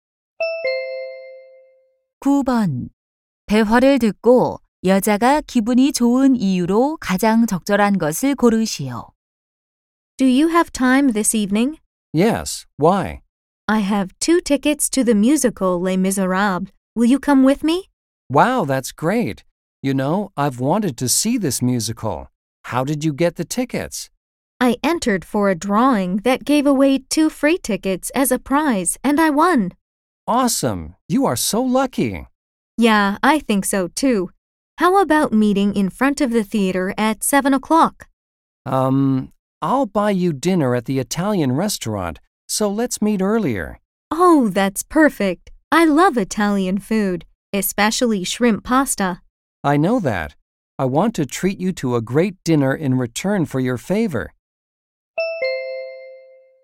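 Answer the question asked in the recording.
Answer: 추첨에 당첨되어 무료 뮤지컬 표를 얻어서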